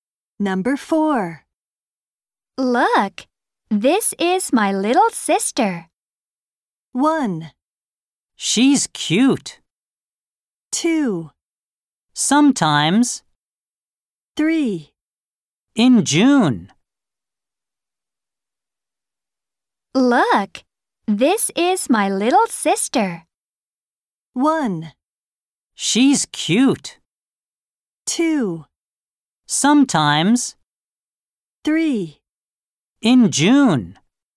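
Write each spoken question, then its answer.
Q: Look, this is my little sister.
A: 1: She's cute.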